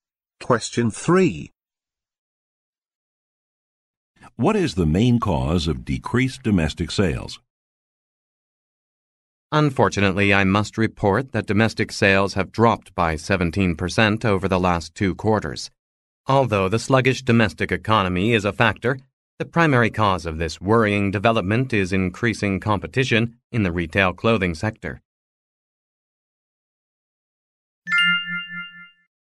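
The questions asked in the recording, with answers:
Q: What is the main cause of decreased domestic sales?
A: Increasing competition in the retail clothing sector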